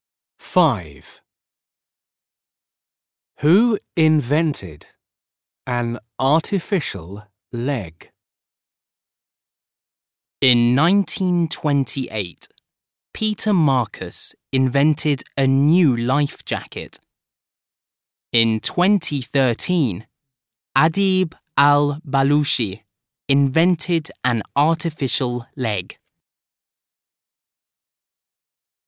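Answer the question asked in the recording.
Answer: Adib al-Balushi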